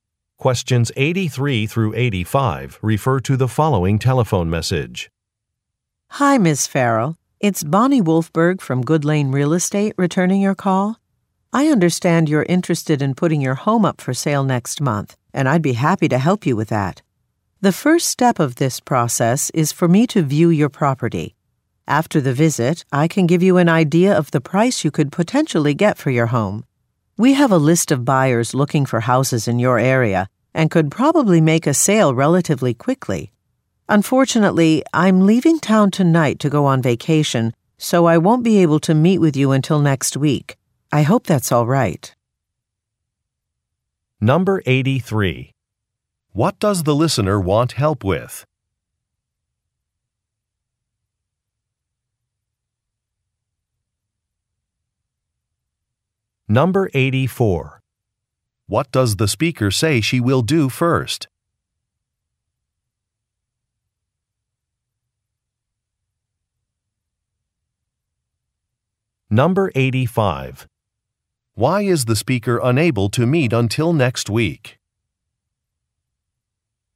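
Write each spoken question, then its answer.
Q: What does the listener want help with?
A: Selling her home

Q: What does the speaker say she will do first?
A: View the property

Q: Why is the speaker unable to meet until next week?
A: She is going on vacation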